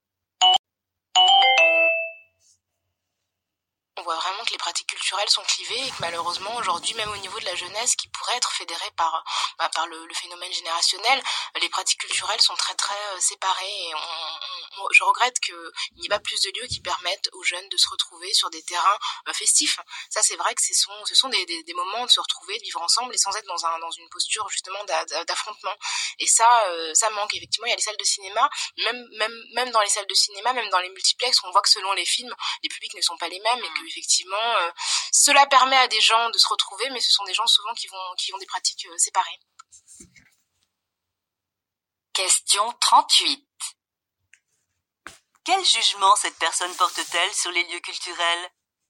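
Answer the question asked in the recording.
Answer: Il manque de lieux où les jeunes se retrouvent; les publics restent séparés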